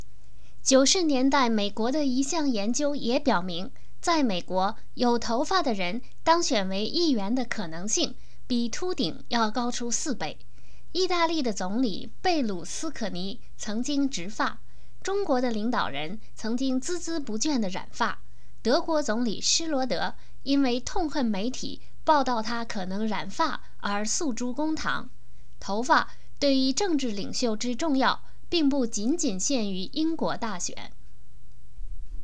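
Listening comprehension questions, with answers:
Please answer the following questions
在美国,有头发的人当选议员的可能性比秃顶高多少倍?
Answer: 4倍

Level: 3rd Year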